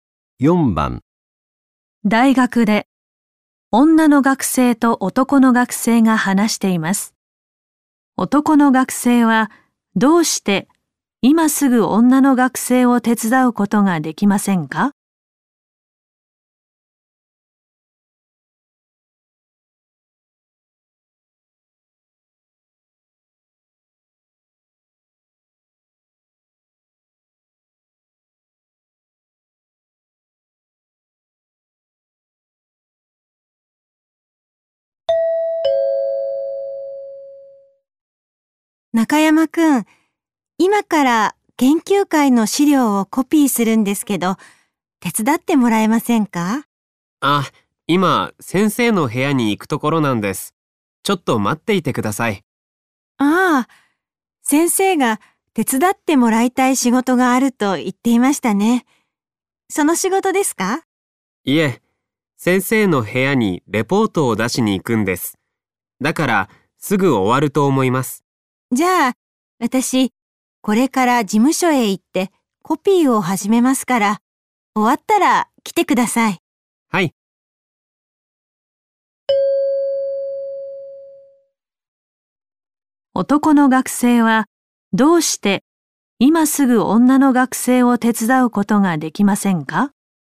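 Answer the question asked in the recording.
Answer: 先生の部屋にレポートを出しに行くから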